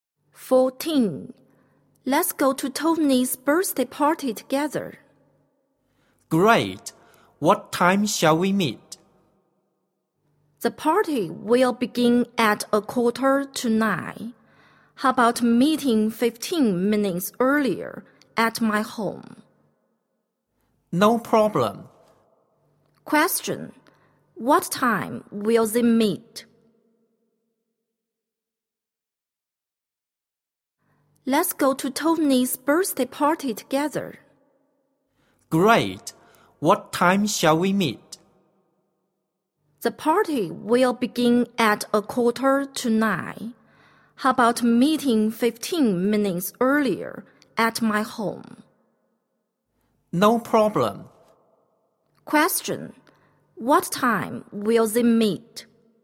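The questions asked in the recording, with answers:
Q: What time will they meet?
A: At 8:30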